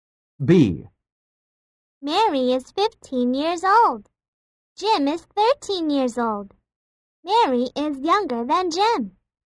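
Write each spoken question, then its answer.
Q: Mary is younger than Jim.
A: False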